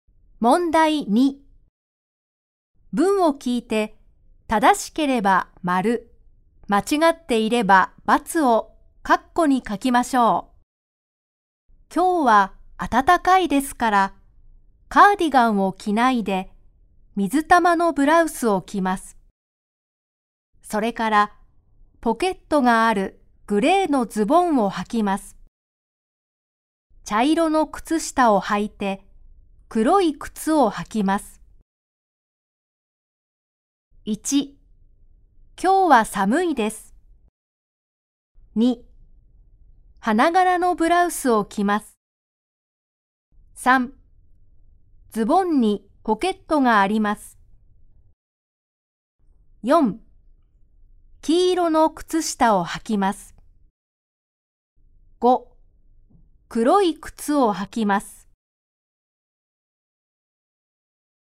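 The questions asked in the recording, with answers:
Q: 今日は寒いです。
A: ×(暖かいです)

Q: 花柄のブラウスを着ます。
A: ×(水玉のブラウスです)

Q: 黄色の靴下を履きます。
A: ×(茶色の靴下です)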